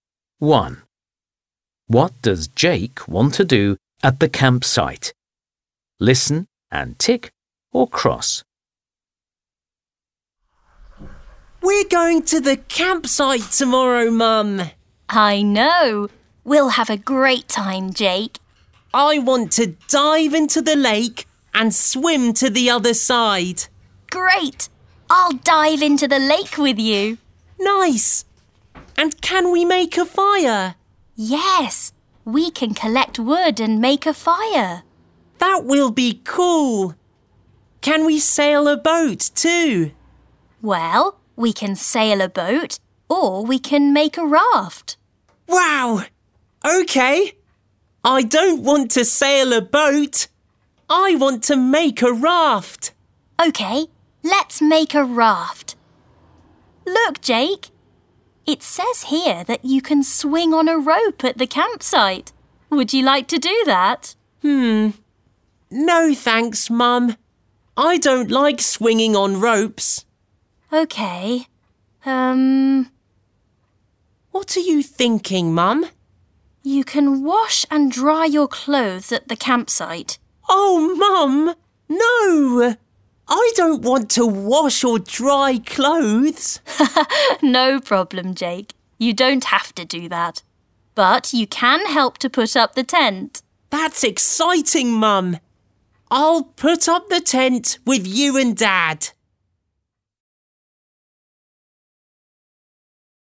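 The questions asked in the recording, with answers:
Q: What does Jake want to do at the campsite?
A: Dive into the lake and swim, make a fire, make a raft and put up the tent (not sail a boat, swing on a rope or wash and dry clothes)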